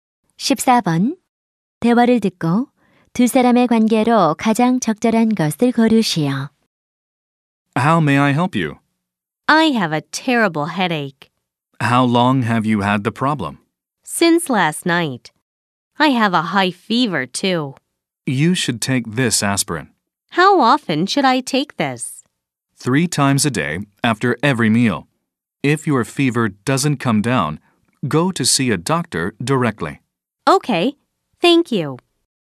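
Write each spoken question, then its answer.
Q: 대화를 듣고 두 사람의 관계로 가장 적절한 것을 고르시오.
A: 약사 - 손님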